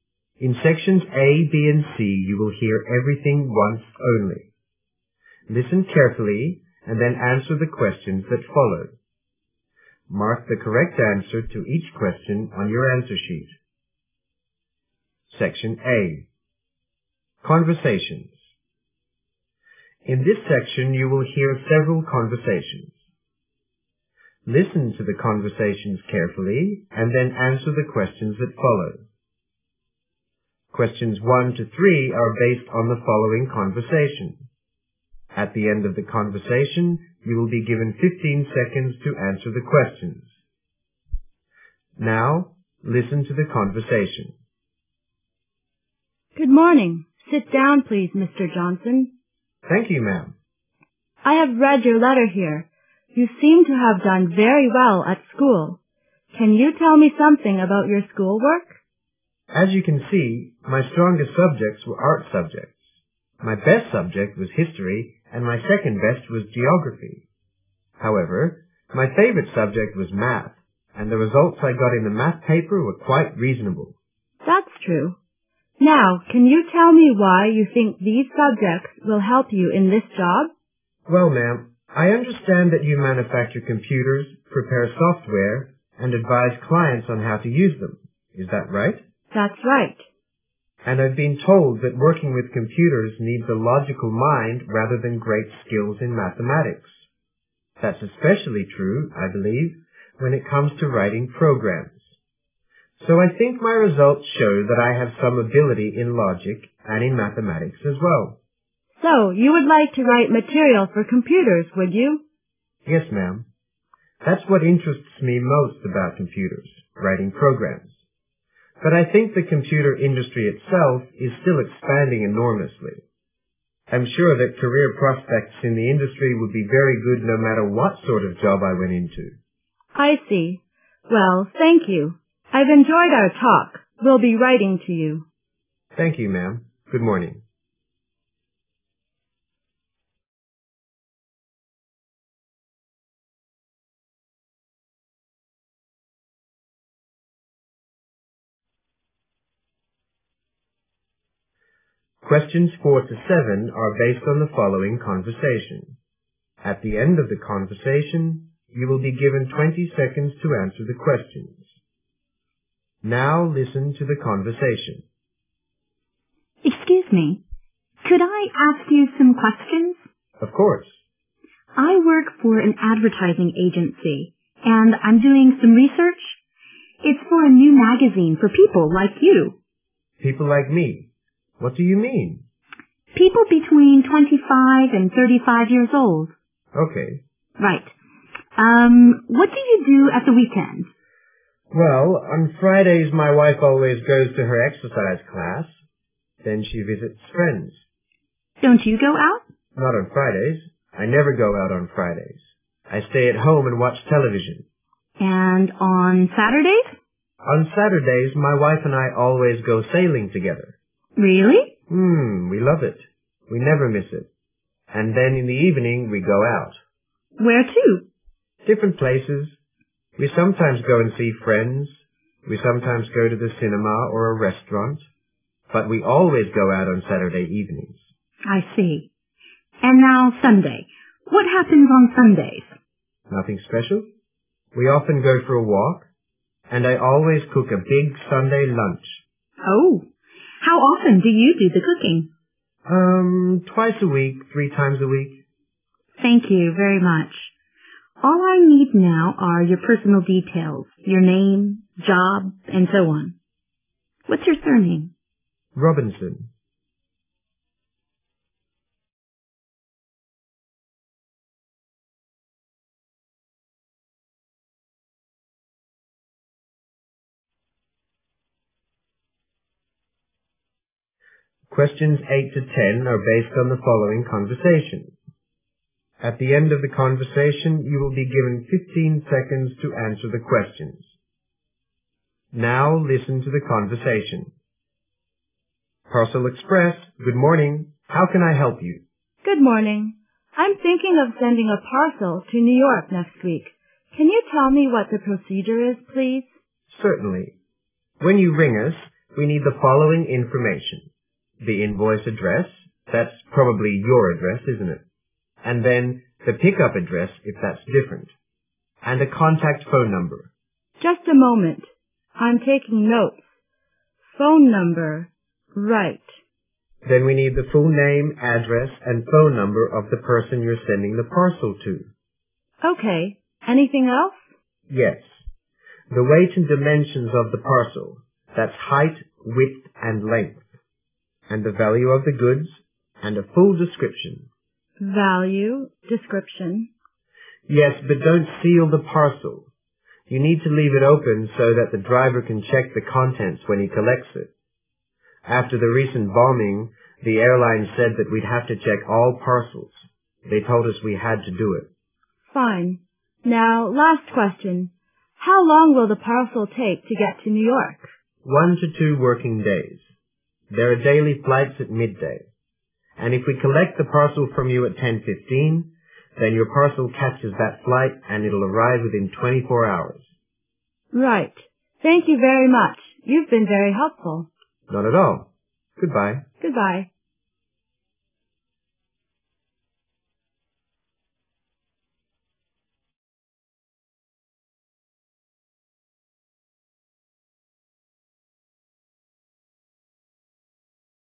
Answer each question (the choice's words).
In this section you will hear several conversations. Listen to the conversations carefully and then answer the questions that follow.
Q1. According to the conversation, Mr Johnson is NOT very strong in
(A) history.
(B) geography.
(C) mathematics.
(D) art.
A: mathematics.

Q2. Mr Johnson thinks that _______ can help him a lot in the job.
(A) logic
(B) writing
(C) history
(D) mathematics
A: logic

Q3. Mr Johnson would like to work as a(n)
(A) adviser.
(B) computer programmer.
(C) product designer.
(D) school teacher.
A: computer programmer.

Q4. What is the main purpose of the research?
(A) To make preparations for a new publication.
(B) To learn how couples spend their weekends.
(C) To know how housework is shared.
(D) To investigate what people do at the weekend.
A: To make preparations for a new publication.

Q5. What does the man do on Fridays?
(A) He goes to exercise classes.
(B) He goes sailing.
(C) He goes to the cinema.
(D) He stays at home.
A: He stays at home.

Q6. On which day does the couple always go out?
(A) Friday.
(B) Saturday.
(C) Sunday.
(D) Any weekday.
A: Saturday.

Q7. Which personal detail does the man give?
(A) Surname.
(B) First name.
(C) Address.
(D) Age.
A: Surname.

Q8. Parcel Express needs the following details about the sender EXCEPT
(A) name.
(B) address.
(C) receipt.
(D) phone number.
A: receipt.

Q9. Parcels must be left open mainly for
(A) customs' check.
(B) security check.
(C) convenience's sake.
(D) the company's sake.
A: security check.

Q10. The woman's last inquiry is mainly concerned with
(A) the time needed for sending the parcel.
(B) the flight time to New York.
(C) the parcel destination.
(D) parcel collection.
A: the time needed for sending the parcel.

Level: GRADE FOUR